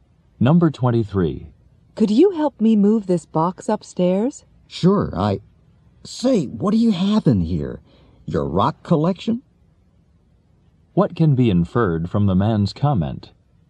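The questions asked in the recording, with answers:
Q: What can be inferred from the man's comment?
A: The box is very heavy.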